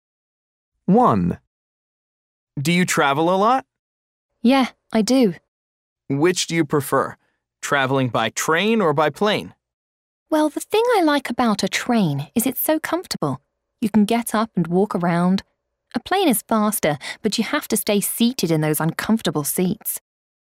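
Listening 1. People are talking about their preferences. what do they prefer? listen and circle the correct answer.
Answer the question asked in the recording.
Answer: traveling by train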